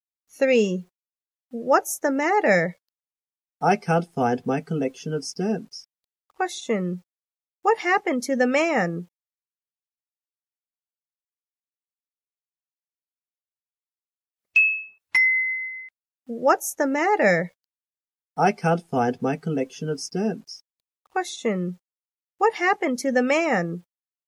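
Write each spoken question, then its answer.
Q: Question, what happened to the man?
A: He can't find his collection of stamps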